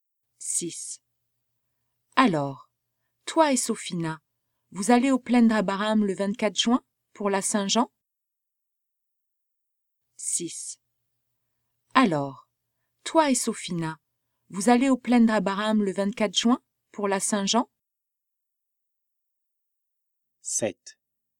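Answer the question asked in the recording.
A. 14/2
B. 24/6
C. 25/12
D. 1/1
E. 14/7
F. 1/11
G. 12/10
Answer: B. 24/6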